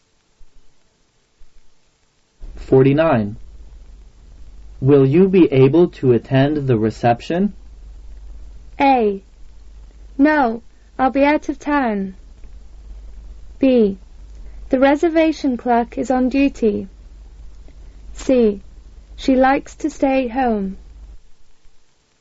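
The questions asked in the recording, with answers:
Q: Will you be able to attend the reception?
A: A: No, I'll be out of town.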